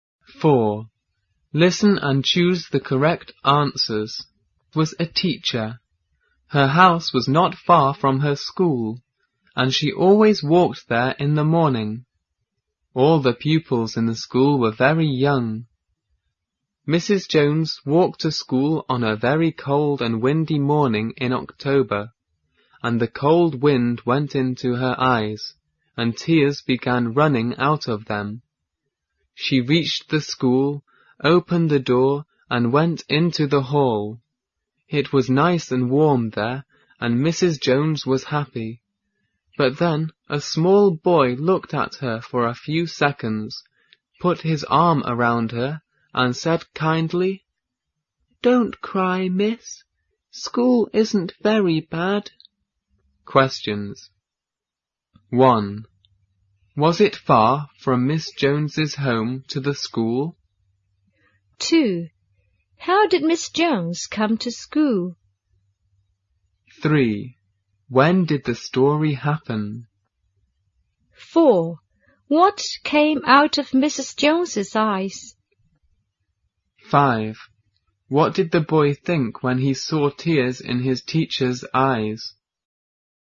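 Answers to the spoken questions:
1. No, it wasn't.
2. She walked.
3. On a cold and windy morning in October.
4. Tears.
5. He thought she was crying because she didn't want to come to school.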